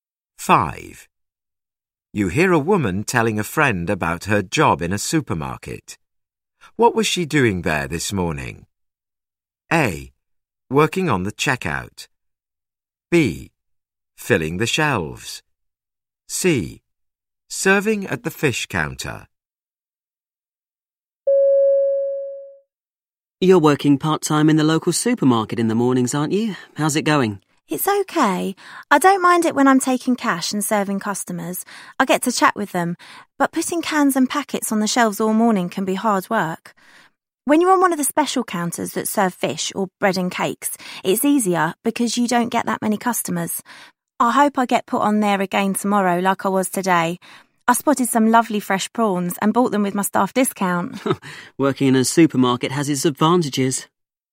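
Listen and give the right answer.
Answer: C: Serving at the fish counter.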